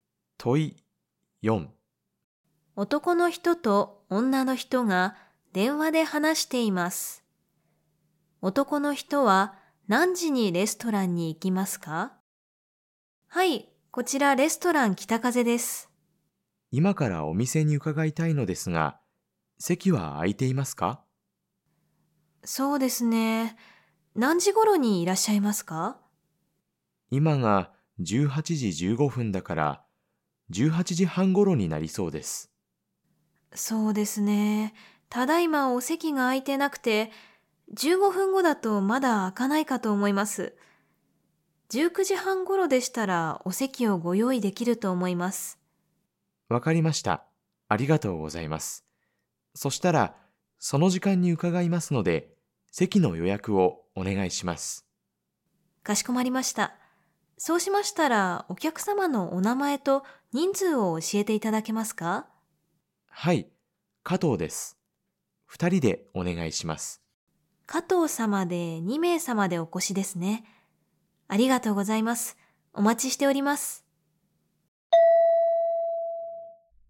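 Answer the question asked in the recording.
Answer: 19時半頃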